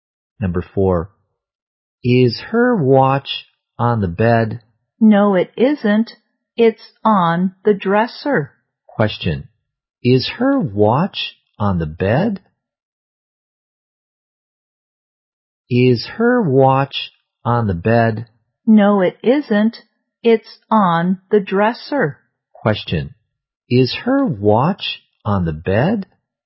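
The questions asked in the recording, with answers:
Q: Question, is her watch on the bed?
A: No, it's on the dresser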